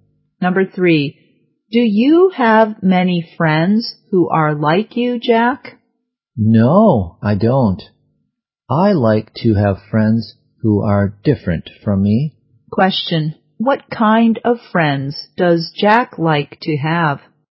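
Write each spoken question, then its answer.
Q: what kind of friends does Jack like to have?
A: Friends who are different from him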